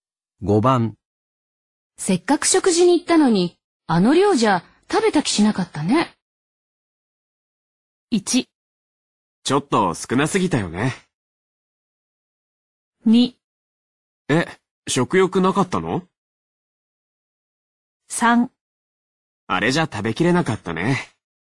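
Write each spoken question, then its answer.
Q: せっかく食事に行ったのに、あの量じゃ食べた気しなかったね。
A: 1: ちょっと少なすぎたよね。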